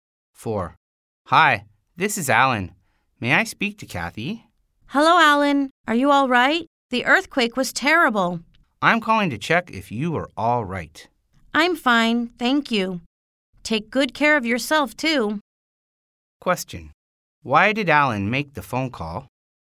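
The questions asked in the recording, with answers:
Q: Why did Alan make the phone call?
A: To check if Kathy was all right after the earthquake.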